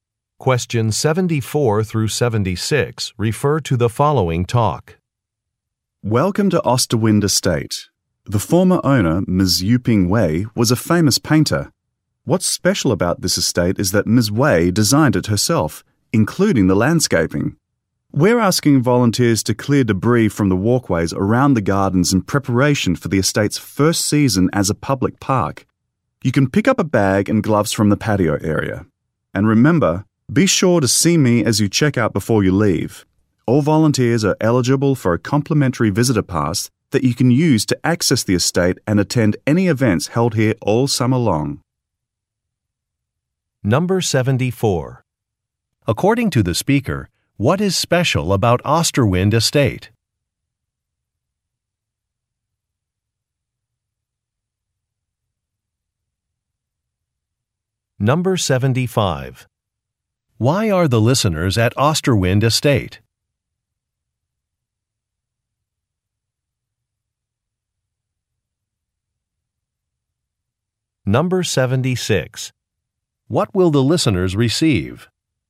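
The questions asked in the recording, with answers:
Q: According to the speaker, what is special about Osterwind Estate?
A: The former owner, a painter, designed it herself.

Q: Why are the listeners at Osterwind Estate?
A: To volunteer clearing debris from the walkways.

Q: What will the listeners receive?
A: A complimentary visitor pass.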